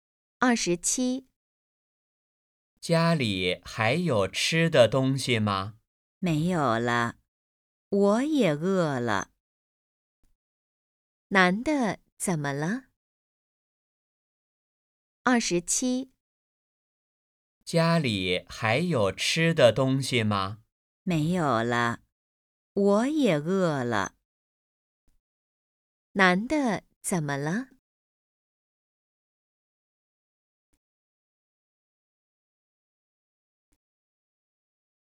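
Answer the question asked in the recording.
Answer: 饿了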